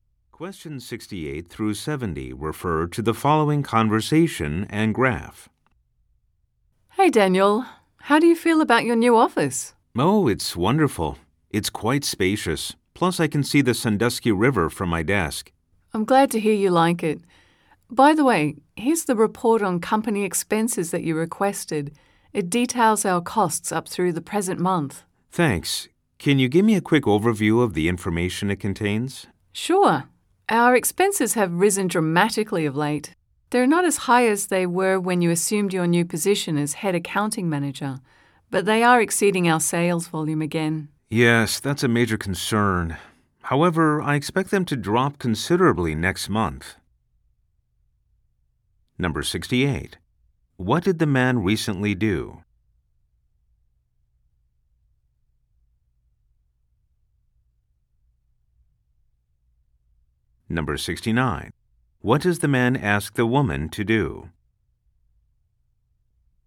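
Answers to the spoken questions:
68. Moved to a new office
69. Give an overview of the expense report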